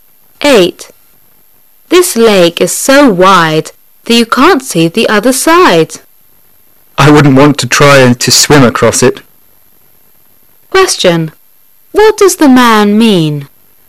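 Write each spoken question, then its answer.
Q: What does the man mean?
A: The lake is too wide for him to swim across.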